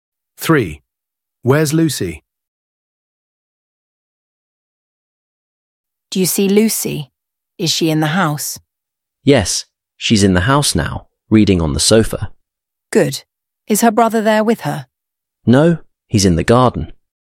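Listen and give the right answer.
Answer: In the house, reading on the sofa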